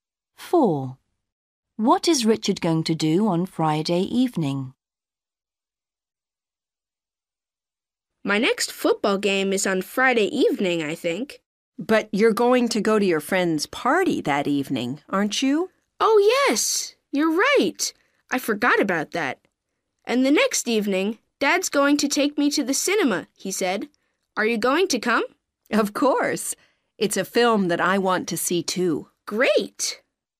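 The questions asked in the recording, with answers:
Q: What is Richard going to do on Friday evening?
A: go to his friend's party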